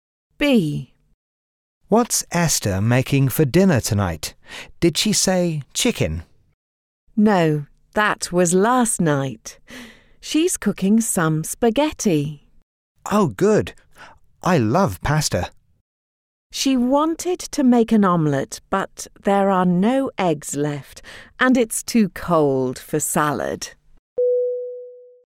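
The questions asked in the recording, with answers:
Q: What's Esther making for dinner tonight?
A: Spaghetti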